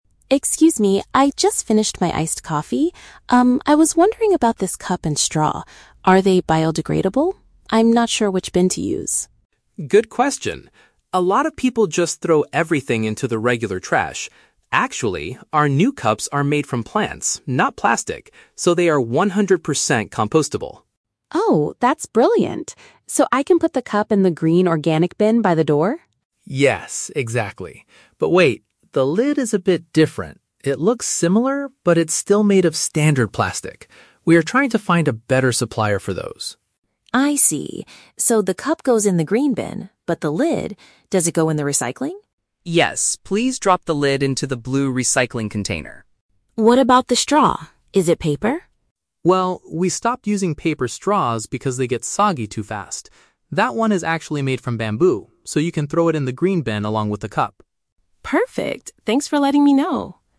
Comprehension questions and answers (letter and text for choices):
Listen to the conversation between a customer and a cafe employee, then choose the correct answer (A, B, or C) for each question.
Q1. What is the main material used to make the cafe's new cups?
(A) Standard plastic.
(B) Recycled paper.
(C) Plant-based materials.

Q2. Where should the customer put the top part of her drink?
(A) In the normal garbage can.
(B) In the blue recycling container.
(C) In the green organic bin.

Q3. Why did the coffee shop stop providing paper straws?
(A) Because they become soft and wet too quickly.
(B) Because bamboo straws are much cheaper to buy.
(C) Because customers complained about their taste.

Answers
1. (C) Plant-based materials.
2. (B) In the blue recycling container.
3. (A) Because they become soft and wet too quickly.

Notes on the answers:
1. The employee says the new cups are "made from plants." Option (C) paraphrases this as "plant-based materials." Option (A) is a trap; standard plastic is used for the lid, but the cup is "not plastic." Option (B) is a trap; "paper" is mentioned later when talking about straws, but it is not the material of the cup.
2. The top part of the drink is the "lid." The employee explicitly says to "drop the lid into the blue recycling container." Option (C) is a trap; the green bin is for the cup and the straw, not the lid. Option (A) is a trap; the regular trash is mentioned at the very beginning as a mistake that "a lot of people" make.
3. The employee explains that they stopped using paper straws because "they get soggy too fast." The phrase "become soft and wet" is a paraphrase of the word "soggy." Options (B) and (C) are plausible real-life reasons for changing straws, but they are never mentioned in the audio.

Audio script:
Customer: Excuse me, I just finished my iced coffee. Um, I was wondering about this cup and straw. Are they biodegradable? I'm not sure which bin to use.
Employee: Good question! A lot of people just throw everything into the regular trash. Actually, our new cups are made from plants, not plastic. So, they are one hundred percent compostable.
Customer: Oh, that's brilliant. So I can put the cup in the green organic bin by the door?
Employee: Yes, exactly. But wait, the lid is a bit different. It looks similar, but it's still made of standard plastic. We are trying to find a better supplier for those.
Customer: I see. So the cup goes in the green bin, but the lid... does it go in the recycling?
Employee: Yes, please drop the lid into the blue recycling container.
Customer: What about the straw? Is it paper?
Employee: Well, we stopped using paper straws because they get soggy too fast. That one is actually made from bamboo, so you can throw it in the green bin along with the cup.
Customer: Perfect. Thanks for letting me know!